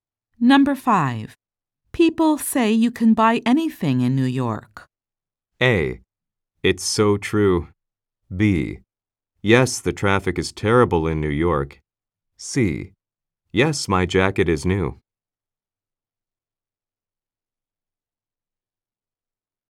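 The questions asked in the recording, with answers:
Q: People say you can buy anything in New York.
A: A: It's so true.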